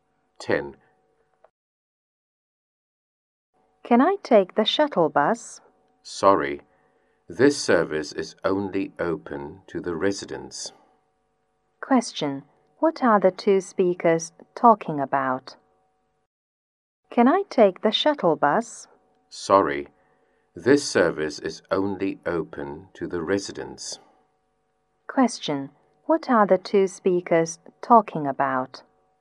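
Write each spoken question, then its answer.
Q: What are the two speakers talking about?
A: The shuttle bus, which only residents can use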